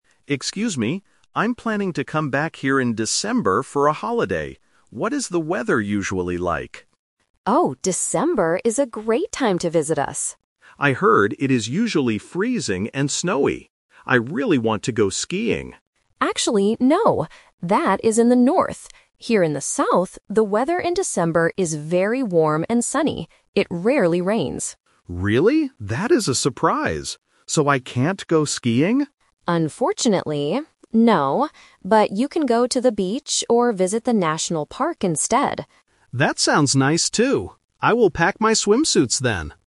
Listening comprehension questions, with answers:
Listen to the conversation and choose the best answer (A, B, or C).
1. What is the weather usually like here in December?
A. Freezing and snowy.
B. Warm and sunny.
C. Cloudy and rainy.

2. What does the receptionist suggest the tourist do in December?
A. Go skiing.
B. Go to the beach.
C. Stay inside the hotel.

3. What will the tourist pack for the December trip?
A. Swimsuits.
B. Thick winter coats.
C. Raincoats and umbrellas.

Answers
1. B. Warm and sunny.
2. B. Go to the beach.
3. A. Swimsuits.

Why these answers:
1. The receptionist clarifies the local weather by saying, "Here in the south, the weather in December is very warm and sunny." Option (A) is the trap because it is what the tourist thought the weather would be. Option (C) is a trap because the receptionist says it "rarely rains".
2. The receptionist suggests, "But you can go to the beach or visit the national park instead." Option (A) is the trap because skiing was the tourist's initial plan, but it is rejected ("Unfortunately, no") due to the lack of snow. Option (C) is never mentioned.
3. After hearing about the warm weather and the beach, the tourist says, "I will pack my swimsuits then." Option (B) is a trap based on the initial assumption of freezing weather. Option (C) is a trap because it doesn't fit the "rarely rains" description.

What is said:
Tourist: Excuse me. I'm planning to come back here in December for a holiday. What is the weather usually like?
Receptionist: Oh, December is a great time to visit us!
Tourist: I heard it is usually freezing and snowy. I really want to go skiing.
Receptionist: Actually, no. That is in the north. Here in the south, the weather in December is very warm and sunny. It rarely rains.
Tourist: Really? That is a surprise. So I can't go skiing?
Receptionist: Unfortunately, no. But you can go to the beach or visit the national park instead.

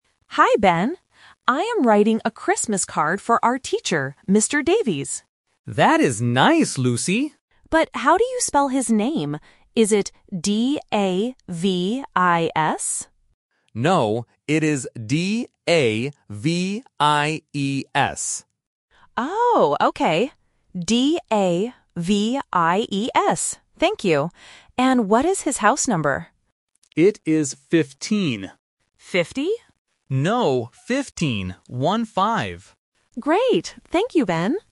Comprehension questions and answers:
Listen to the conversation and choose the correct answer (A, B, or C).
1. Who is Lucy writing a card for?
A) Ben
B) Her teacher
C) Her sister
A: B) Her teacher

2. How do you spell the teacher's name?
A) D-A-V-I-S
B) D-A-V-I-E-S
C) D-A-V-E-Y-S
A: B) D-A-V-I-E-S

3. What is the teacher's house number?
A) 15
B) 50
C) 55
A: A) 15

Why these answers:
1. Lucy says, "I am writing a Christmas card for our teacher." Trap: Option (A) is a trap because Ben is the person Lucy is talking to, not the person receiving the card.
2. Ben corrects Lucy and spells the name: "D-A-V-I-E-S". Lucy also repeats it to confirm. Trap: Option (A) is a trap. This is Lucy's first guess, but Ben says "No".
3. Ben says the house number is 15 and makes it clear by saying "One-five." Trap: Option (B) is a classic trap for A1 learners. "Fifteen" (15) and "Fifty" (50) sound very similar. Lucy hears 50, but Ben corrects her.

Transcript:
Lucy: Hi, Ben. I am writing a Christmas card for our teacher, Mr. Davies.
Ben: That is nice, Lucy!
Lucy: But how do you spell his name? Is it D-A-V-I-S?
Ben: No, it is D-A-V-I-E-S.
Lucy: Oh, okay. D-A-V-I-E-S. Thank you! And what is his house number?
Ben: It is 15.
Lucy: 50?

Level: A1

